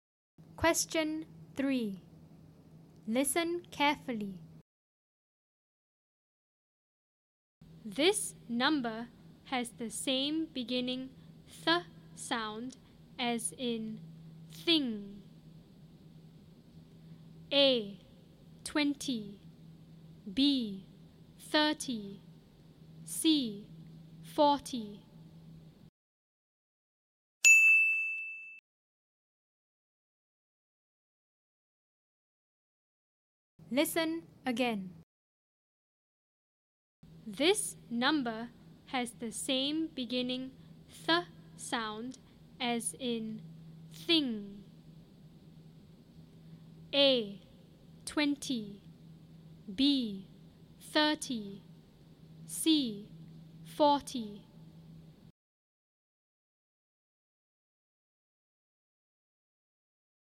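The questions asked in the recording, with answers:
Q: This number has the same beginning th sound as in thing.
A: B: 30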